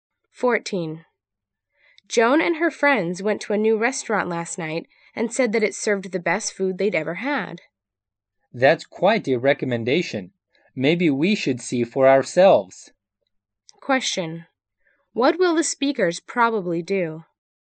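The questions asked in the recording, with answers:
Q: What will the speakers probably do?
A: Try the new restaurant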